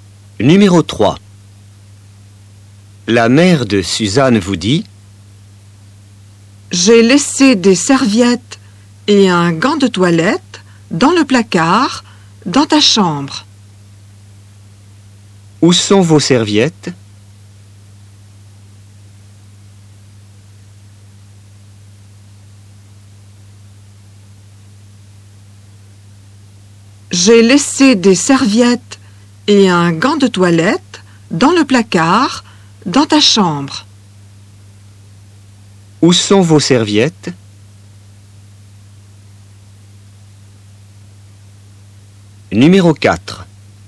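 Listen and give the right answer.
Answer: dans le placard, dans la chambre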